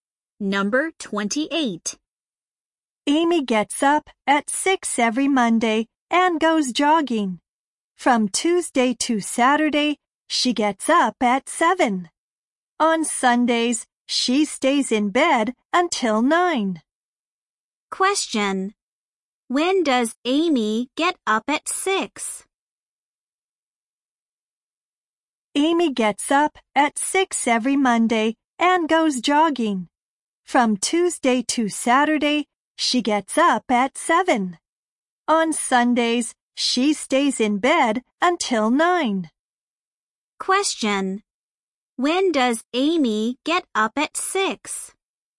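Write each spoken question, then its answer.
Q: When does Amy get up at 6?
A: On Mondays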